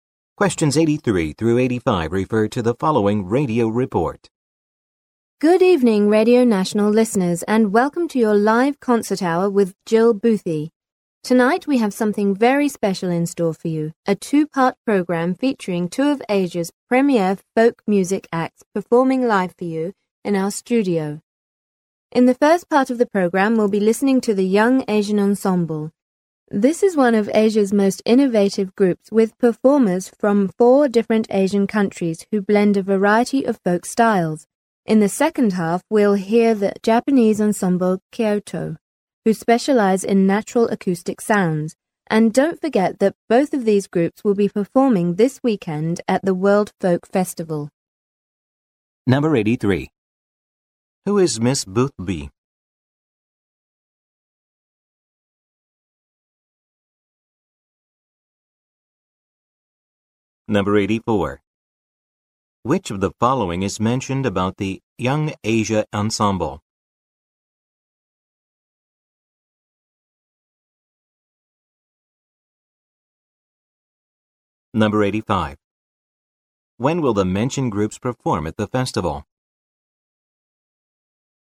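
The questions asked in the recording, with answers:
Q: Who is Miss Boothby?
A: A radio host of the live concert hour

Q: Which of the following is mentioned about the Young Asia Ensemble?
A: It has performers from four Asian countries who blend folk styles

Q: When will the mentioned groups perform at the festival?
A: This weekend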